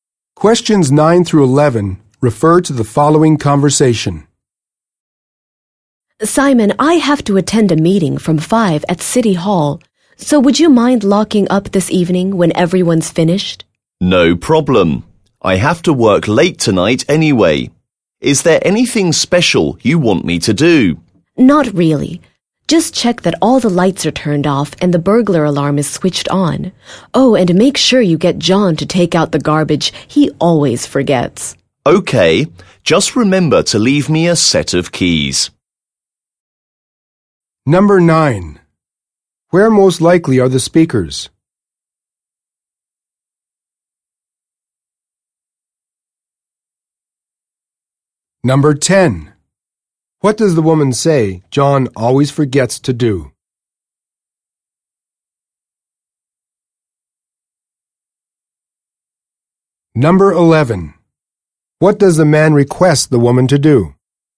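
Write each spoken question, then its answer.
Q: What does the woman say John always forgets to do?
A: Take out the garbage

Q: What does the man request the woman to do?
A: Leave him a set of keys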